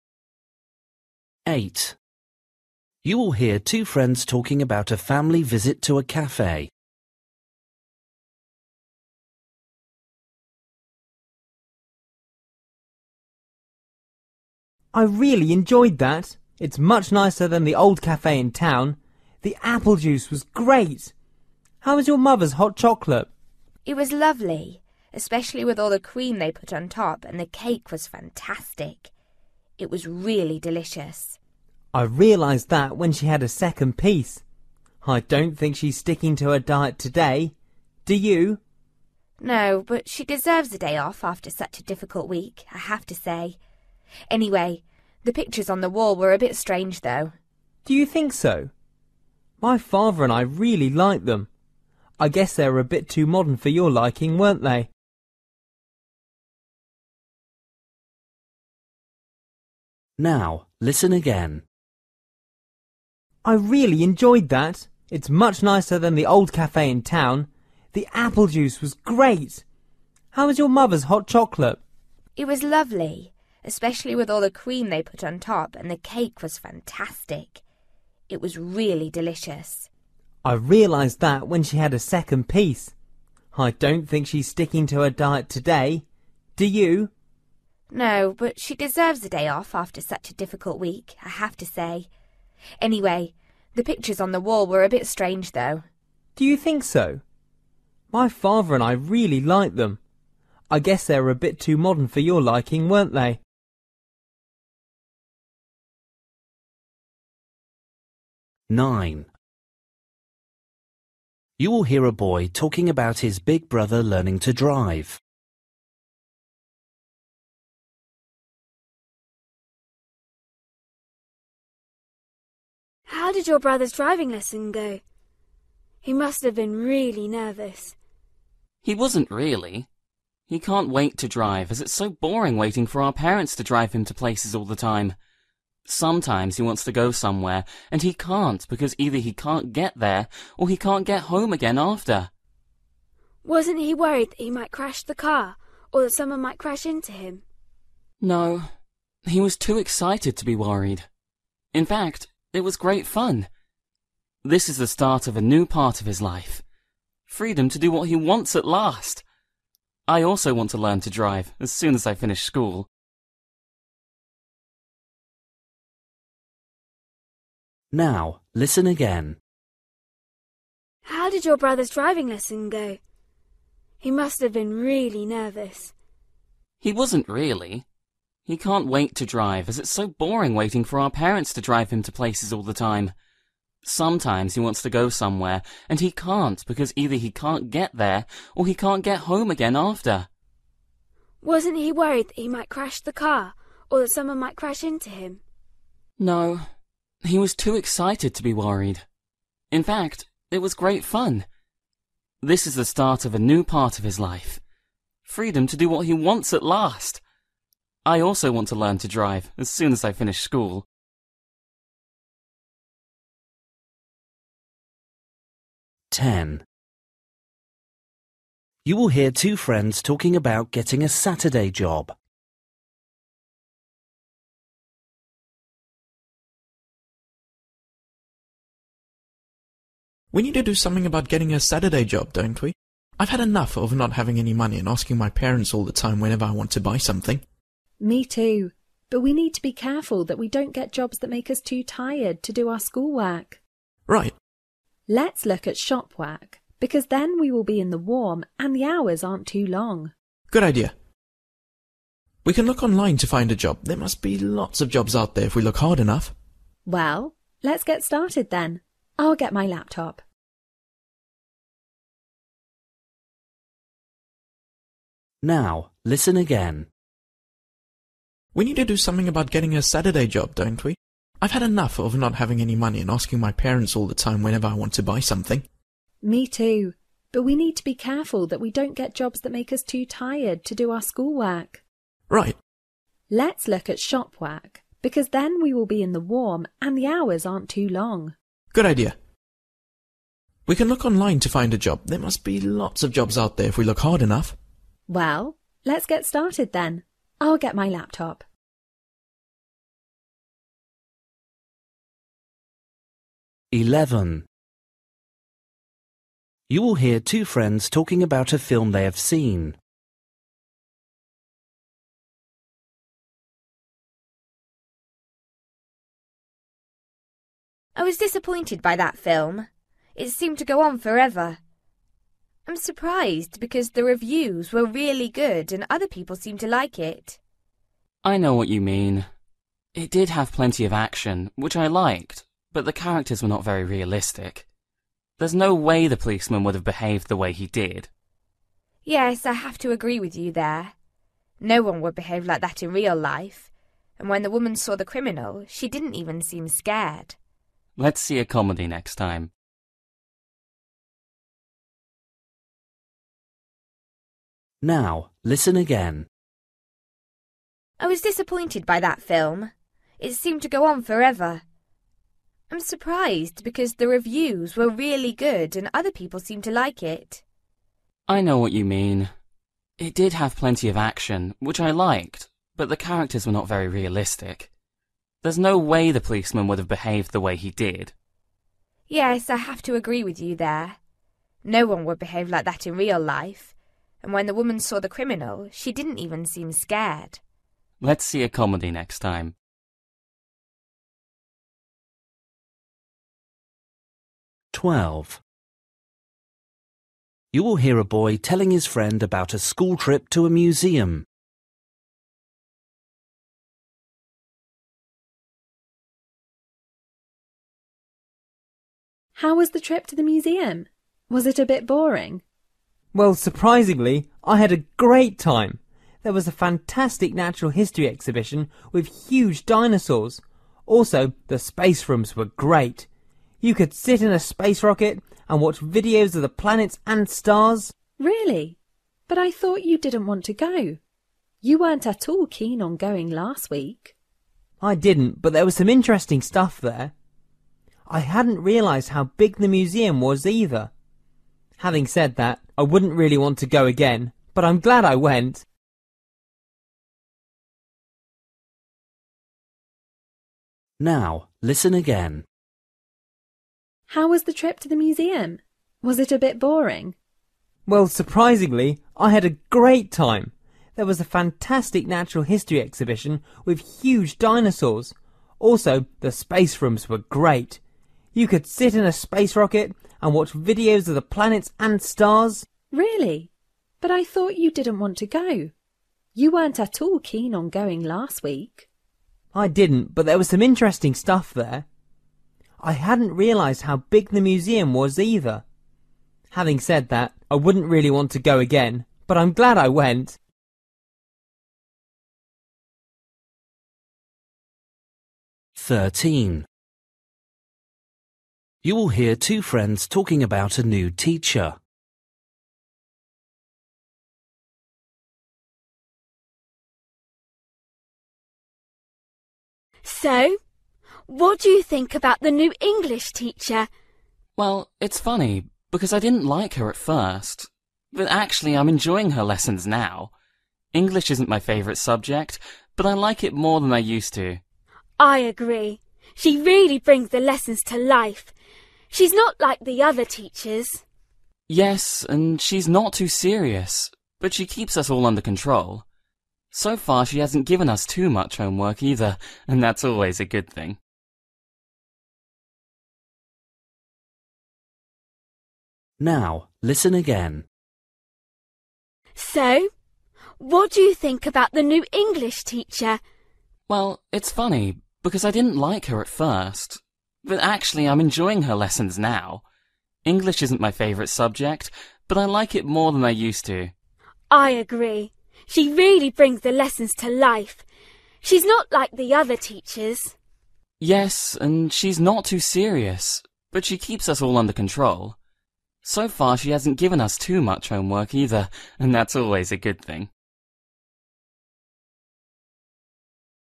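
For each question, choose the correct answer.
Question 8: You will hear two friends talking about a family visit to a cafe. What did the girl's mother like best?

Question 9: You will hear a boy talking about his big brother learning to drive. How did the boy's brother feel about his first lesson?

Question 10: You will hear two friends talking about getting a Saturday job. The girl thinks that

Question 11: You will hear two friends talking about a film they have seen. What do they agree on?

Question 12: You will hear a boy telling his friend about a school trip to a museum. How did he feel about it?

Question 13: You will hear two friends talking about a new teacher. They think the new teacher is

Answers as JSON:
{"8": "the cake", "9": "excited; it was great fun", "10": "they should not get jobs that make them too tired for schoolwork", "11": "the characters were not realistic", "12": "he enjoyed it more than he expected but wouldn't go again", "13": "different from the other teachers; brings lessons to life"}

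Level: Luyện nghe trình độ B1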